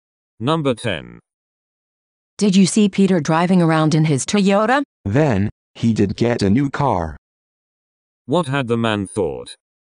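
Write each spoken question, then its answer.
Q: What had the man thought?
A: That Peter had not got a new car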